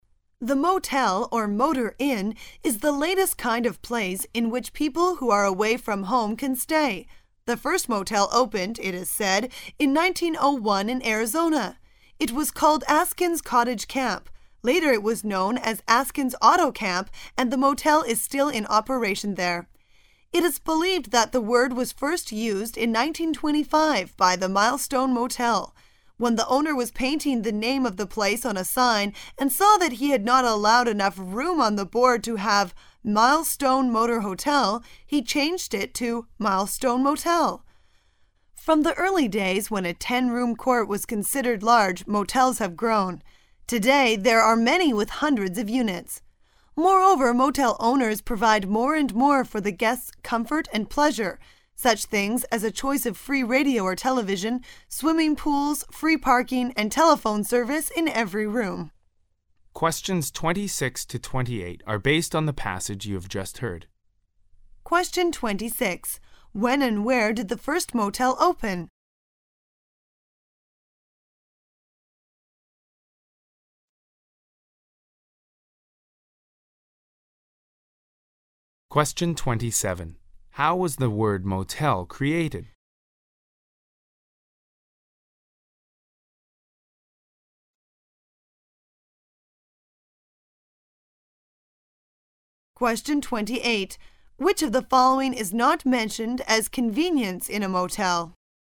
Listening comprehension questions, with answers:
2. How was the word "Motel" created?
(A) When the owner was painting his room for "Milestone Motor Hotel", he thought of it.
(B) It stands for "many hotel rooms" in Milestone Motor Hotel.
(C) The owner disliked the name of "Milestone Motor Hotel" and changed it.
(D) The owner shortened the full name of the hotel for lack of space on the signboard.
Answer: The owner shortened the full name of the hotel for lack of space on the signboard.

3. Which of the following is not mentioned as convenience in a motel?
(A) Radio or TV.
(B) Telephone.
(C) Computer.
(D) Swimming pool.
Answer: Computer.

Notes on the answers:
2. 事实题。通过浏览选项,很快发现四个选项的共同之处:与"Milestone Motor Hotel"的名称有关,考生可推测本题与Milestone Motor Hotel的名称有关,就要注意听有这个关键词的句子:he had not allowed enough room on the board to have"Milestone Motor Hotel", he changed it to"Milestone Motel".——"Milestone Motor Hotel"旅馆老板在写招牌时为省空间,把招牌板上原先的"Milestone Motor Hotel"三个单词的名字更名为两个字的店名"Mile stone Motel"。此处难点是对单词room的正确理解,此处为"空间"(space),而不是平常意义的"房间"。正确答案为D。
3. 细节题。本题比较容易,从选项中推测要注意听和电视、游泳池等相关的句子,听到最后一句(如今汽车旅馆为了方便顾客提供很多便利服务)"such things as a choice of free radio or television,swimming pool,free parking and telephone service in every room."可见,computer未提及。正确答案为C。

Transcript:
[解析] 26-28 The motel, or motor inn, is the latest kind of place in which people who are away from home can stay. The first motel opened, it is said, in 1901 in Arizona. It was called Askin' s Cottage Camp. Later it was known as Askin' s Auto Camp, and the motel is still in operation there. It is believed that the word was first used in 1925 by the Milestone Motel. When the owner was painting the name of the place on a sign and saw that he had not allowed enough room on the board to have "Milestone Motor Hotel", he changed it to "Milestone Motel". Front the early days when a ten-room court was considered large, motels have grown. Today there are many with hundreds of units. Moreover, motel owners provide more and more for the guests' comfort and pleasure--such things as a choice of free radio or television, swimming pools, free parking and telephone service in every room. When and where did the first motel open?

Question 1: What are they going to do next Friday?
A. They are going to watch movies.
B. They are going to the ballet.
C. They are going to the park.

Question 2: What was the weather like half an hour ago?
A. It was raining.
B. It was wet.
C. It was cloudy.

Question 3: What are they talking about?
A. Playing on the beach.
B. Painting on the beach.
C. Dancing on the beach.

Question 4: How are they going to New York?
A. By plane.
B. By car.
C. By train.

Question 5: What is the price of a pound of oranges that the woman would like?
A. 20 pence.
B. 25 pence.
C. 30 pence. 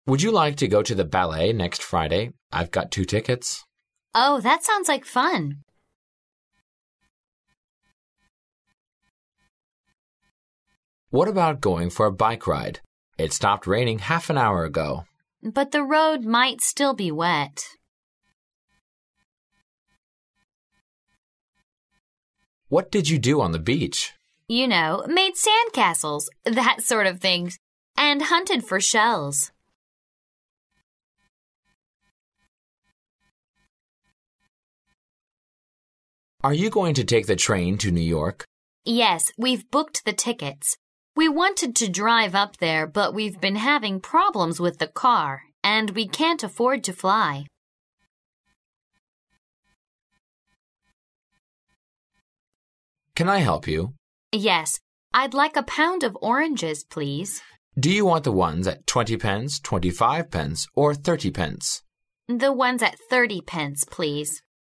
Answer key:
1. They are going to the ballet.
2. It was raining.
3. Playing on the beach.
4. By train.
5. 30 pence.

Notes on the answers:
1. M: Would you like to go to the ballet next Friday? I've got two tickets. W: Oh, that sounds like fun.
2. M: What about going for a bike-ride? It stopped raining half an hour ago. W: But the road might still be wet.
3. M: What did you do on the beach? W: You know, made sand castles that sort of things, and hunted for shells.
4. M: Are you going to take the train to New York? W: Yes, we've booked the tickets. We wanted to drive up there but we've been having problems with the car and we can't afford to fly.
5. M: Can I help you? W: Yes, I'd like a pound of oranges, please. M: Do you want the ones at 20 pence, 25 pence or 30 pence? W: The ones at 30 pence, please.

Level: 公共英语二级

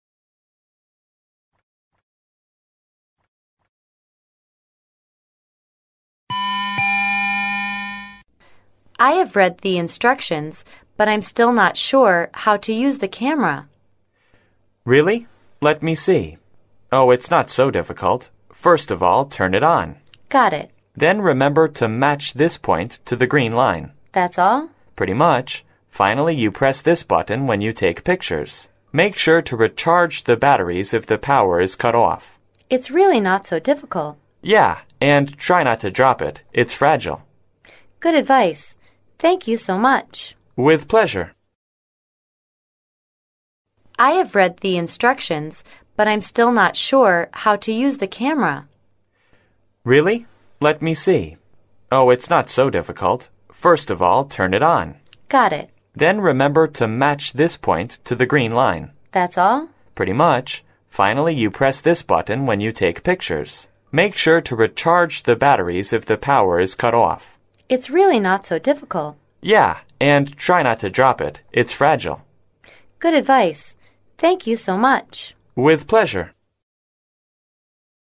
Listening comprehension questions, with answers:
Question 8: When should the batteries be recharged?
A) When the power is used up.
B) Every three days.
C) Every 50 pictures.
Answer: When the power is used up.

